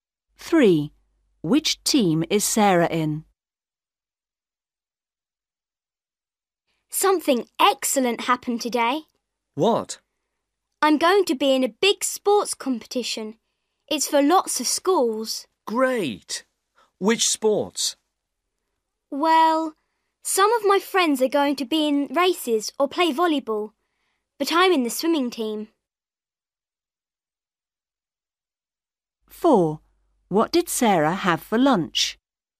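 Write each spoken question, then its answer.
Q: Which team is Sarah in?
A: The swimming team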